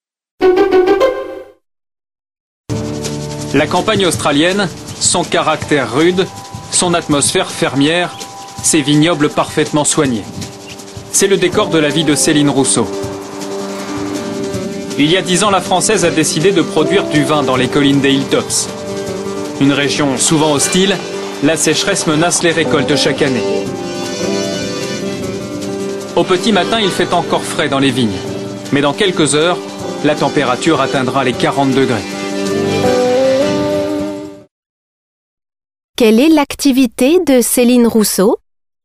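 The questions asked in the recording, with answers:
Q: Quelle est l'activité de Céline Rousseau ?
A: Elle produit du vin (viticultrice) en Australie.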